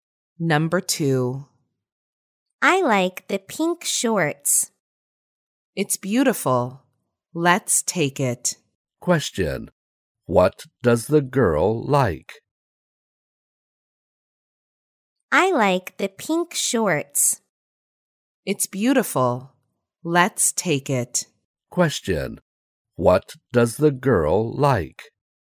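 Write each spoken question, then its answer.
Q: Question. What does the girl like?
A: The pink shorts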